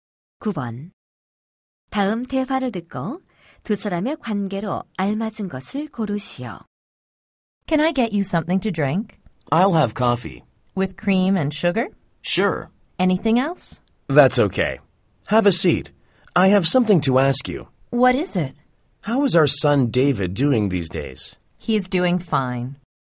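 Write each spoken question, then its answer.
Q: 다음 대화를 듣고 두 사람의 관계로 알맞은 것을 고르시오.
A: 교사와 학부모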